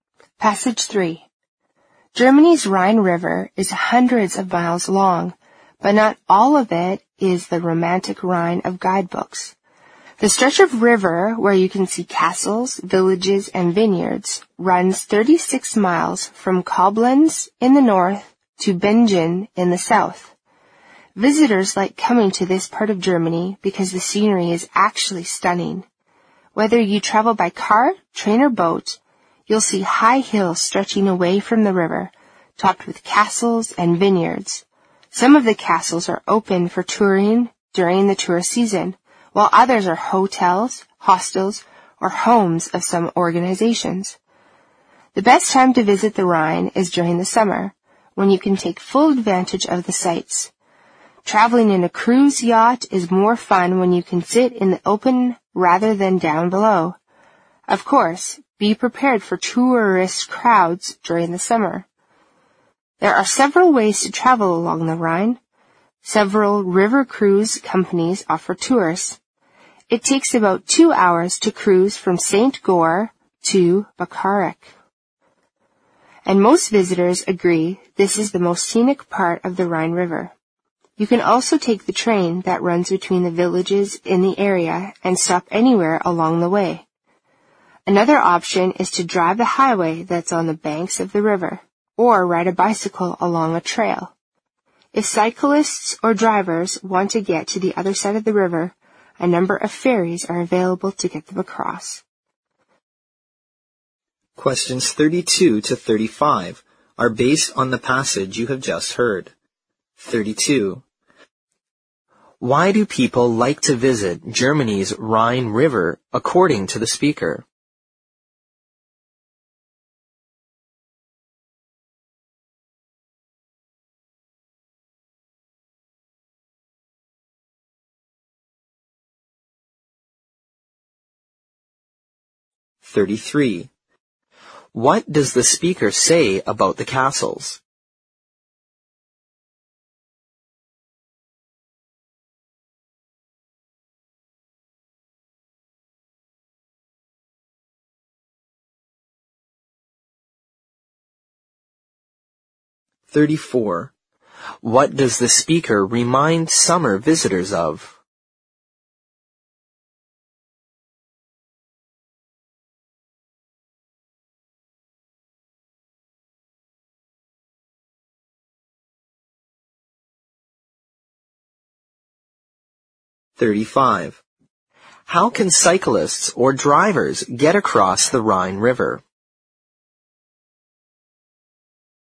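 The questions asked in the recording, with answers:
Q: Why do people like to visit Germany's Rhine River, according to the speaker?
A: The scenery is stunning.

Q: What does the speaker say about the castles?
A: Some are open for touring in the tourist season; others are hotels, hostels or homes of organizations.

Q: What does the speaker remind summer visitors of?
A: To be prepared for tourist crowds.

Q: How can cyclists or drivers get across the Rhine River?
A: By taking a ferry.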